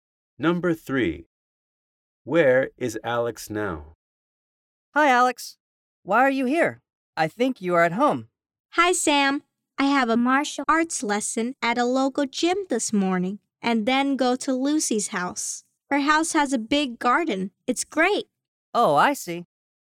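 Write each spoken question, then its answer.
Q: Where is Alex now?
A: At a local gym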